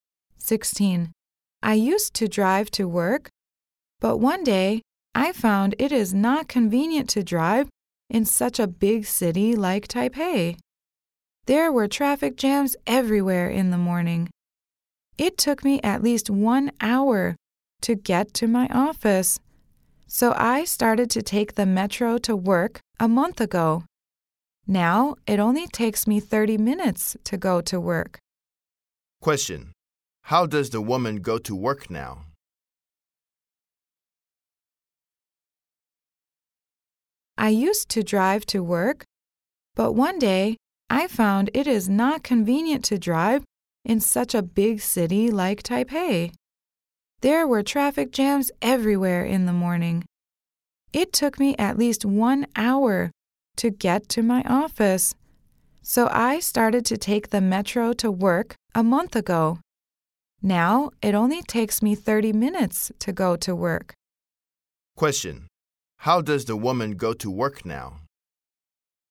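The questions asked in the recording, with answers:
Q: Question. How does the woman go to work now?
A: She takes the metro.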